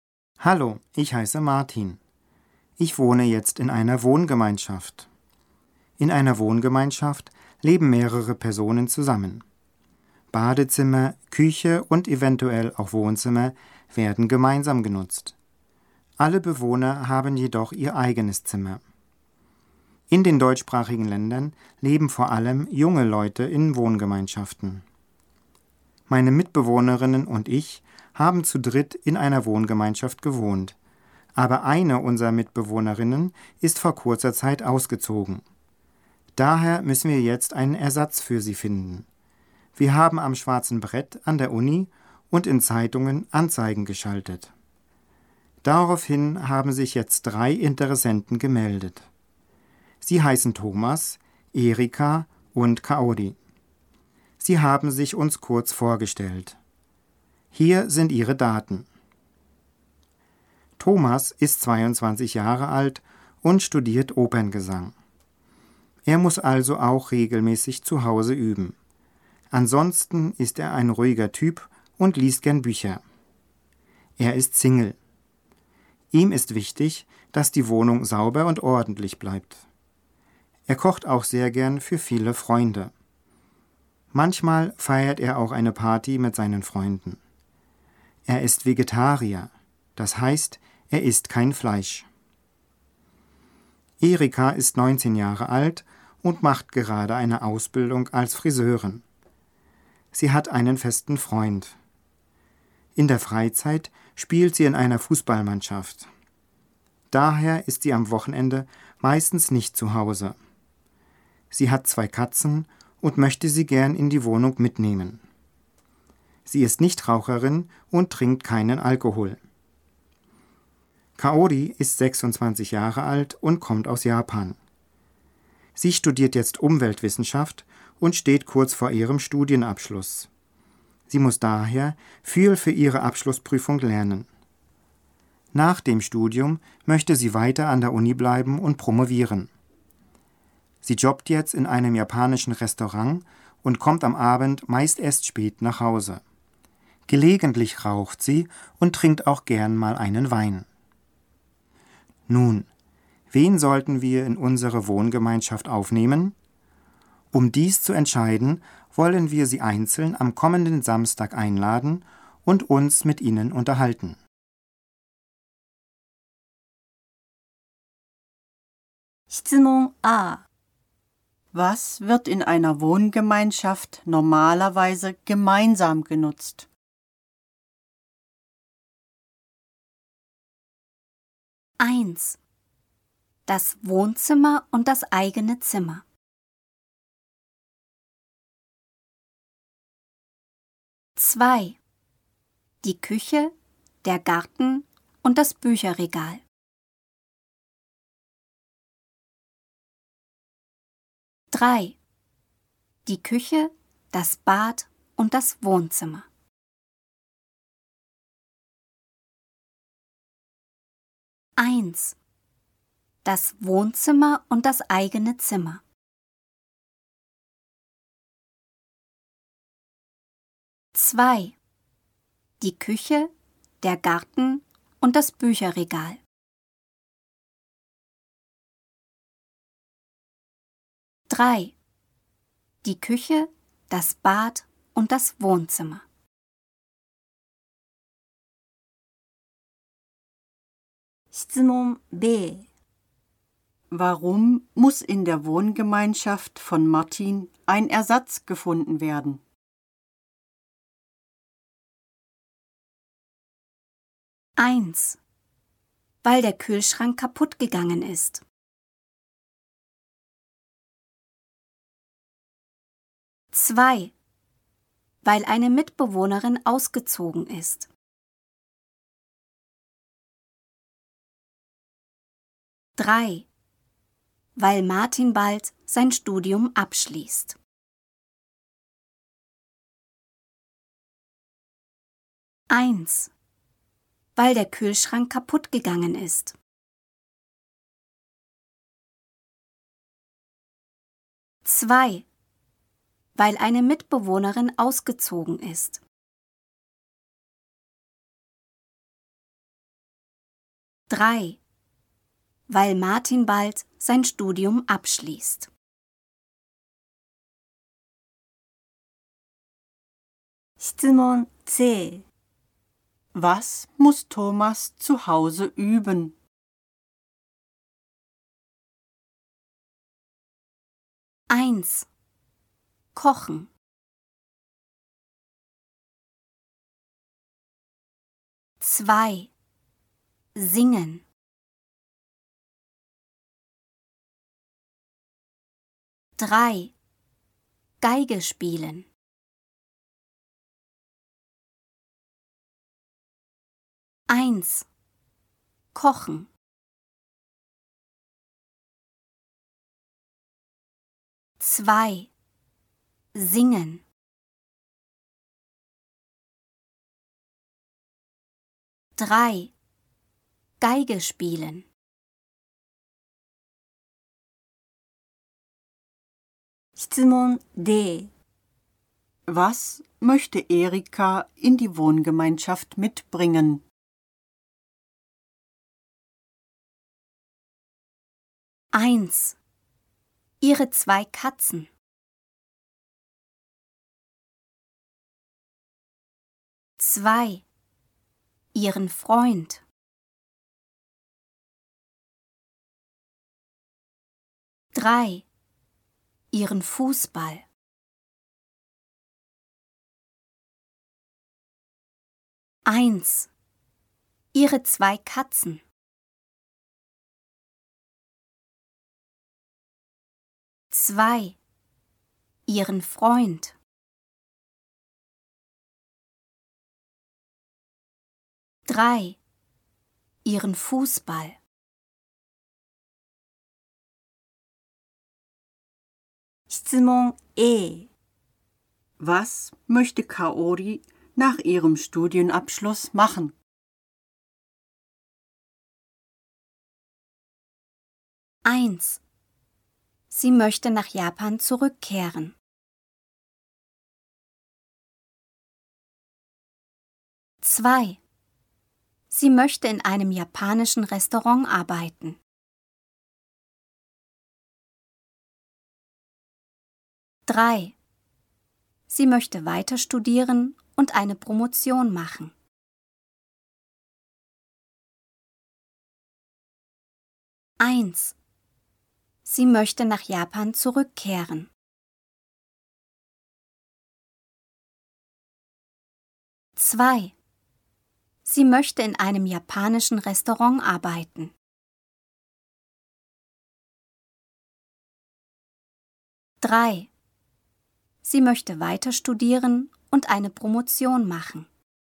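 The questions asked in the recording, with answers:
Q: Was wird in einer Wohngemeinschaft normalerweise gemeinsam genutzt?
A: 3: Die Küche, das Bad und das Wohnzimmer.

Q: Warum muss in der Wohngemeinschaft von Martin ein Ersatz gefunden werden?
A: 2: weil eine Mitbewohnerin ausgezogen ist.

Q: Was muss Thomas zu Hause üben?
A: 2: Singen.

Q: Was möchte Erika in die Wohngemeinschaft mitbringen?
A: 1: Ihre zwei Katzen.

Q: Was möchte Kaori nach ihrem Studienabschluss machen?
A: 3: Sie möchte weiter studieren und eine Promotion machen.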